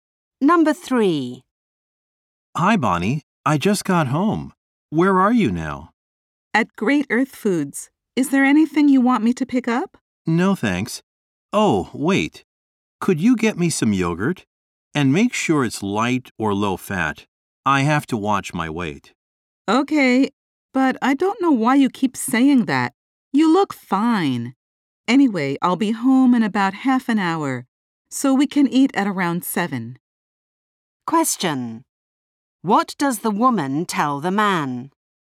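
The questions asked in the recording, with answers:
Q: What does the woman tell the man?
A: To buy light or low-fat yogurt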